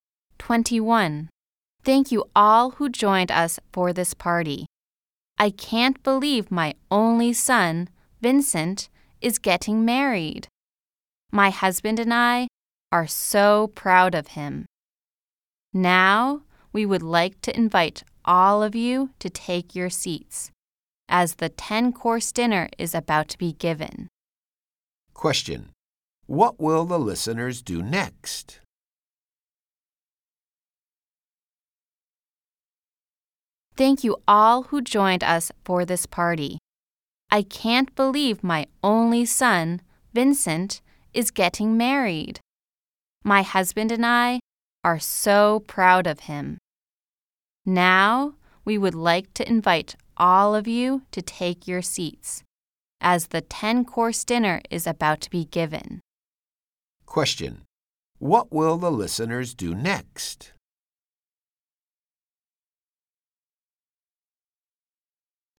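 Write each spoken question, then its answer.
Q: What will the listeners do next?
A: Take their seats and have dinner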